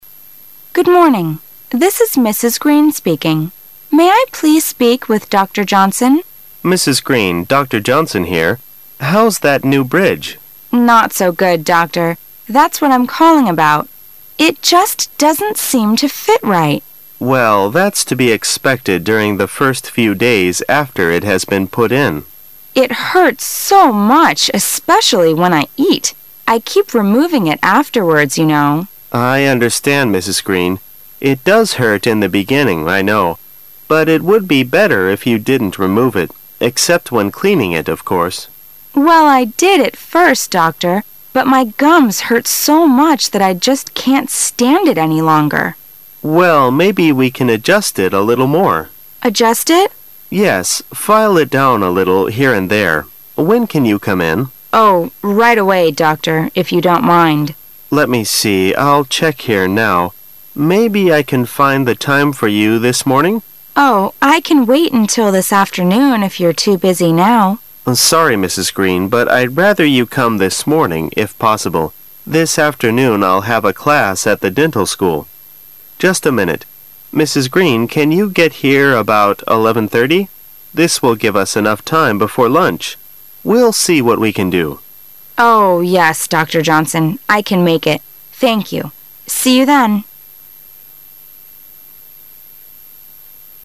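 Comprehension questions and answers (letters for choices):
Questions 14 - 17 are based on the following dialogue.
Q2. How long has Mrs. Green been suffering?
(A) For a few days.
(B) For a few weeks.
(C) For a few months.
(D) For a few years.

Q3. How did the doctor respond to Mrs. Green?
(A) Angry.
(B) Sympathetic.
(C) Indifferent.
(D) Annoyed.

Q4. When will the doctor see Mrs. Green?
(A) This morning.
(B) This afternoon.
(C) Before lunch.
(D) After lunch.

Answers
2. A
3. B
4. A

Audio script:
[解析] 14-17 W: Good morning, this is Mrs. Green speaking. May I please speak with Dr. Johnson? M: Mrs. Green, Dr. Johnson here. How's that new bridge? W: Not so good, doctor. That's what I'm calling about. It just doesn't seem to fit right. M: Well, that's to be expected during the first few days after it has been put in. W: It hurts so much especially when I eat. I keep removing it afterwards, you know. 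M: I understand, Mrs. Green. It does hurt in the beginning I know. But it would be better if you didn't re move it, except when cleaning it, of course. W: Well, I did at first, doctor ,but my gums hurt so much that I just can't stand it any longer. M: Well, maybe we can adjust it a little more. W: Adjust it? M: Yes, file it down a little here and there. When can you come in? W: Oh, right away, doctor, if you don't mind. M: Let me see, I'll check here now. Maybe I can find the time for you this morning. W: Oh, I can wait until this afternoon if you're too busy now. M: Sorry, Mrs. Green, but I'd rather you'd come this morning if possible. This afternoon I'll have a class at the dental school. Just a minute. Mrs. Green, can you get here about 11:307 That will give us enough time before lunch. We'll see what we can do. W: Oh, yes, doctor Johnson. I can make it. Thank you. See you then.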